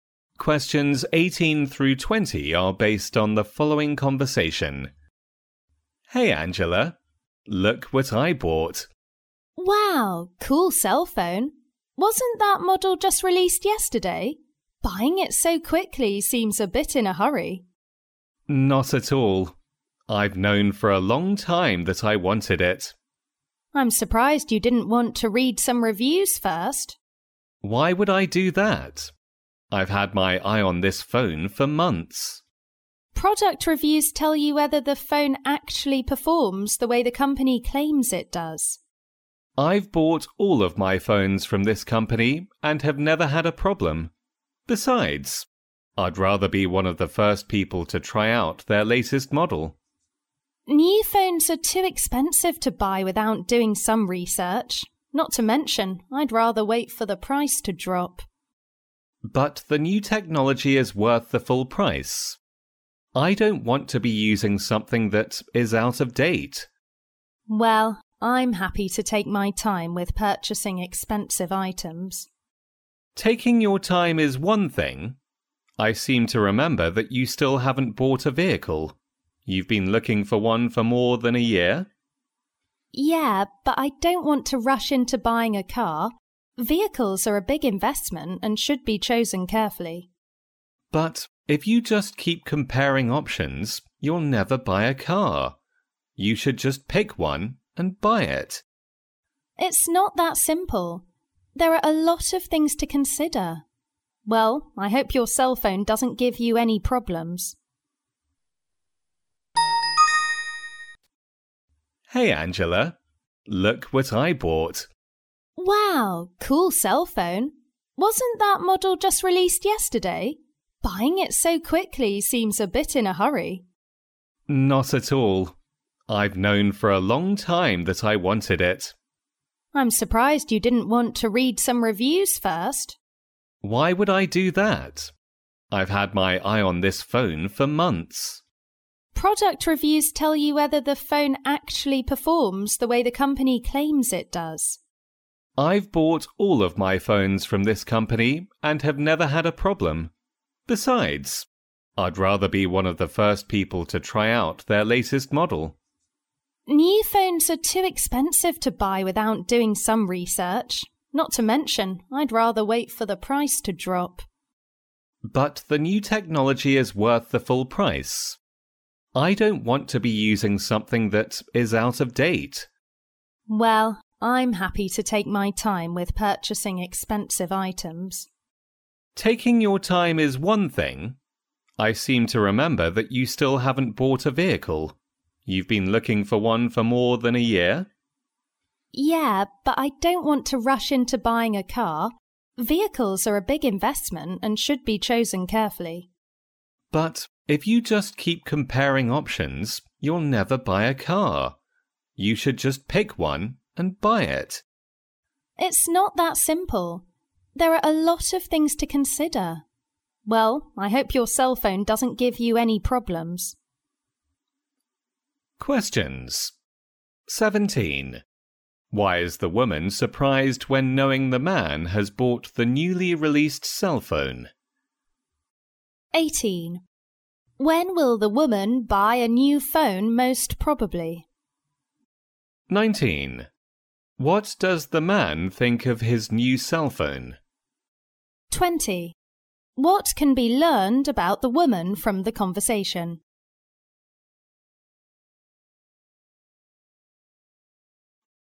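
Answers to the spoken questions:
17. He didn't read any reviews first
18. After doing research and when the price drops
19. The new technology is worth the full price
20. She is careful and takes her time buying expensive items; she still hasn't bought a car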